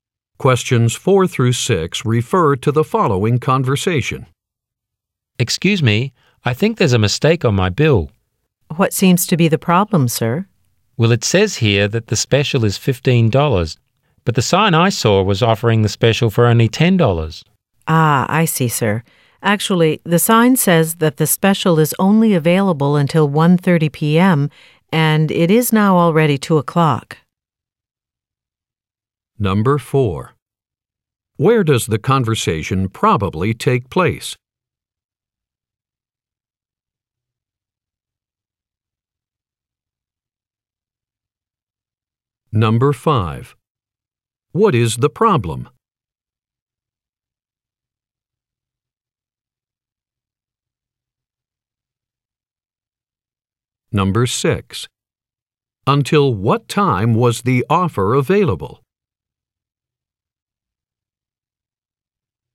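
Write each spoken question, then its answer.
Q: What is the problem?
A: The bill charges $15 for the special instead of $10

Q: Until what time was the offer available?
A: 1:30 p.m.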